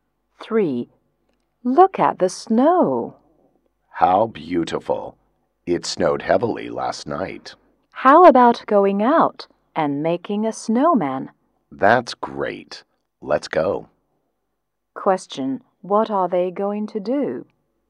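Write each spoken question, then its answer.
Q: What are they going to do?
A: Make a snowman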